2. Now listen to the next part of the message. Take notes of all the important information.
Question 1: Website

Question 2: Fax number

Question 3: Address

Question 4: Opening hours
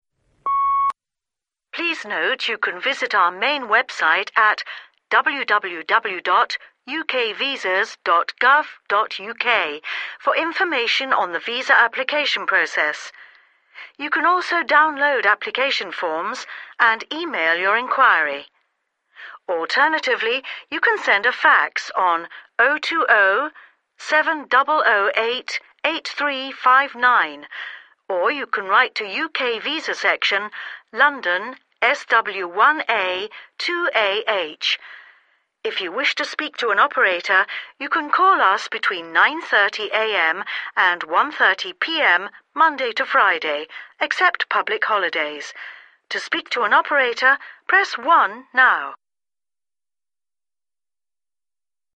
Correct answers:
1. www.ukvisas.gov.uk (download appl. Forms + email Q)
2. 020 7008 8359
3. UK Visa section, London SW1A 2AH
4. 9.30 am – 1.30 pm Mon to Fri (except pub. hols)

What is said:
Please note you can visit our main website at www.ukvisas.gov.uk for information on the visa application process. You can also download application forms, and email your enquiry. Alternatively, you can send a fax on 020 7008 8359, or you can write to UK Visa section, London SW1A 2AH. If you wish to speak to an operator, you can call us between 9.30 am and 1.30 pm Monday to Friday, except public holidays. To speak to an operator, press 1 now.

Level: B2